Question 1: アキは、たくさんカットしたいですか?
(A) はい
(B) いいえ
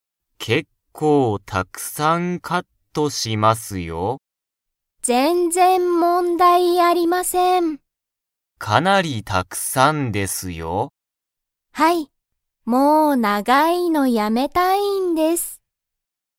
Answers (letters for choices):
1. A

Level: Level 1